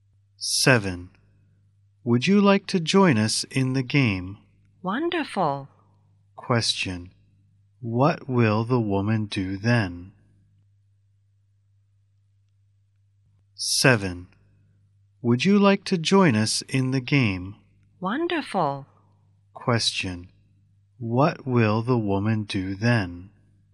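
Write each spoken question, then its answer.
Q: What will the woman do then?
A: Join them in the game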